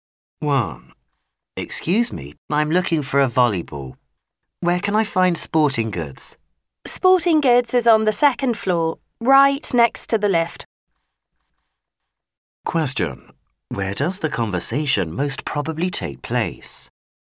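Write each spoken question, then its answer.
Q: Where does the conversation most probably take place?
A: In a department store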